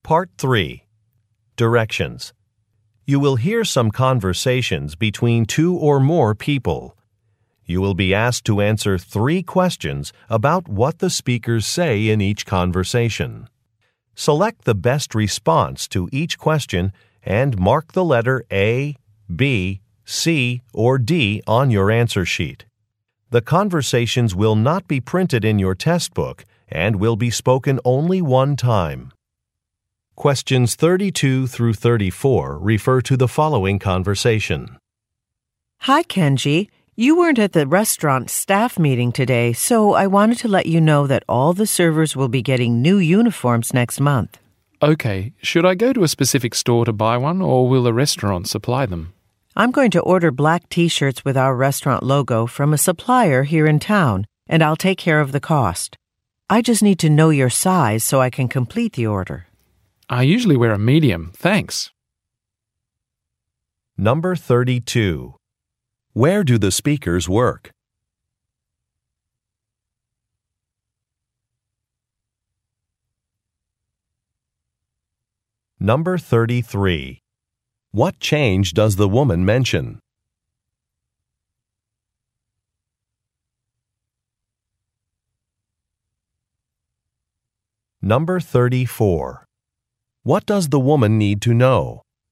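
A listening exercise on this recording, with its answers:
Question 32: Where do the speakers work?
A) At a department store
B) At a pharmacy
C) At a restaurant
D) At a dry cleaner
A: At a restaurant

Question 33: What change does the woman mention?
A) Employees will have to wear ID badges.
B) Credit cards wil now be accepted.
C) Work shifts will be more flexible.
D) Staff will receive different uniforms.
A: Staff will receive different uniforms.

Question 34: What does the woman need to know?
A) The name of a bank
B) The size of some clothing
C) The day of a delivery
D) The color of an item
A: The size of some clothing

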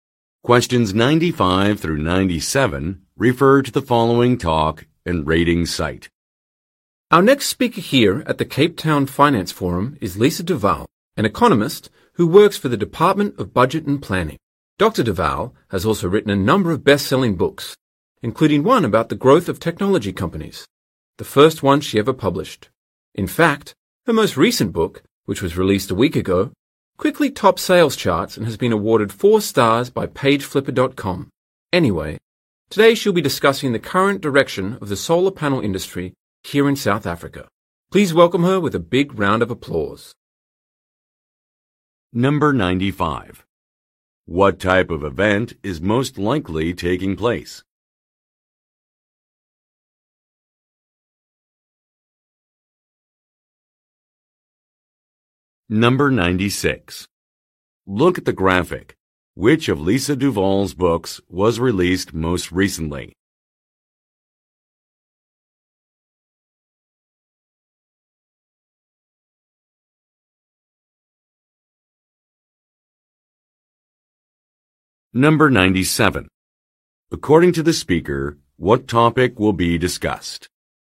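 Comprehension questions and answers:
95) What type of event is most likely taking place?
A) A training session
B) A book launch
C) A financial convention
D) A job fair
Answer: A financial convention

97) According to the speaker, what topic will be discussed?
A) Recycling programs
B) Urban design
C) Organically grown food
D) Renewable energy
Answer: Renewable energy

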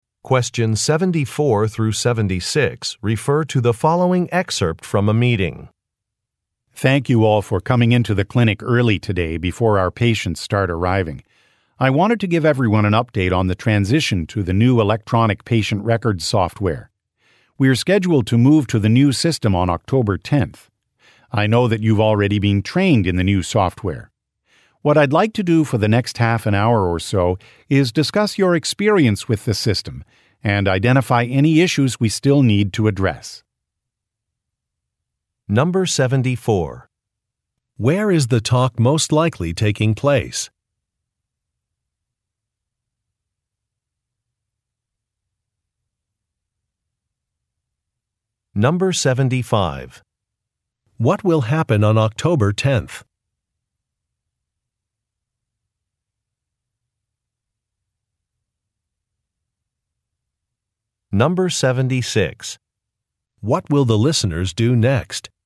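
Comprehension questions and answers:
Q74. Where is the talk most likely taking place?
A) At a software development company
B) At a medical office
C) At a moving company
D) At a training institute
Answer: At a medical office

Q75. What will happen on October tenth?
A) A new manager will join the team.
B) A staff member will be out of the office.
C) A business will move to a new location.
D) A new computer system will be put in place.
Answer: A new computer system will be put in place.

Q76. What will the listeners do next?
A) Schedule appointments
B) View a product demonstration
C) Have a discussion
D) Relocate some files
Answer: Have a discussion

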